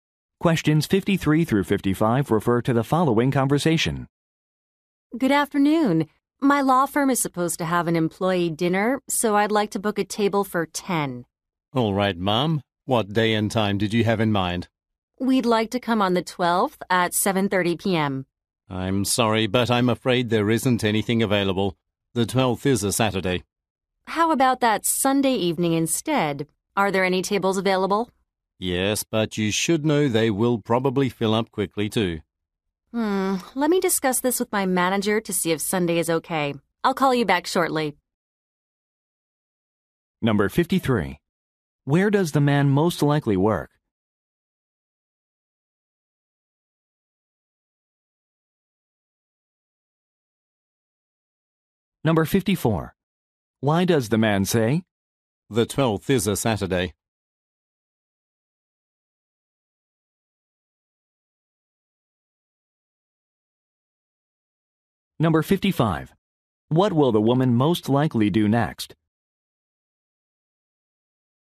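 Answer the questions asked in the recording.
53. At a restaurant
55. Talk with her manager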